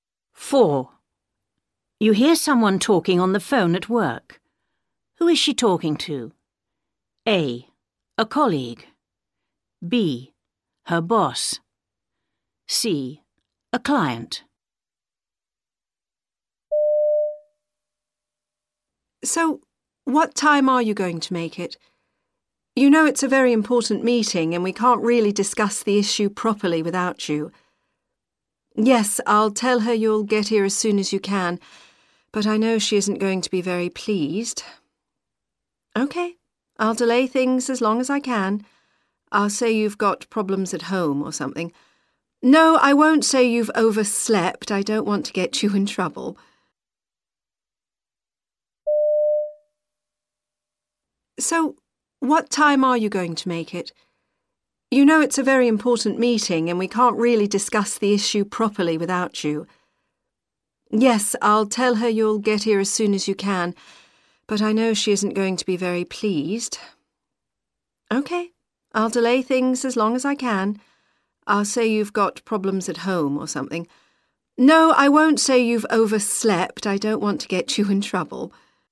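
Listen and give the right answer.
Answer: A: A colleague.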